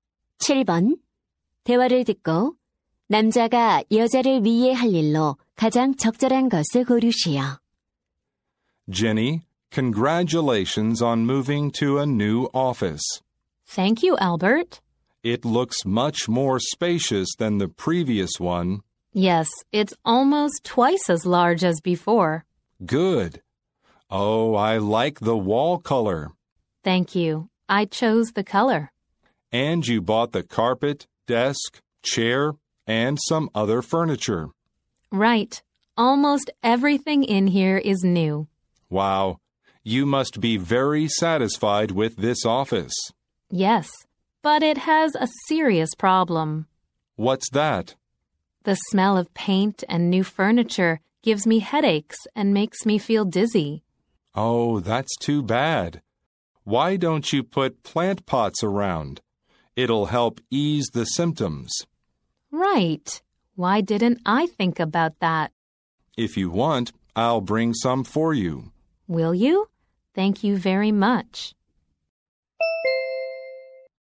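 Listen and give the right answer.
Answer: 화분 가져다주기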